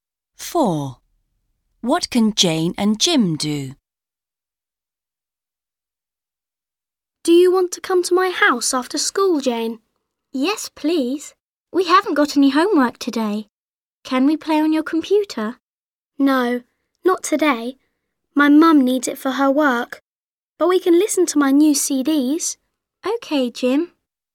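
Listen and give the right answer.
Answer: Listen to Jim's new CDs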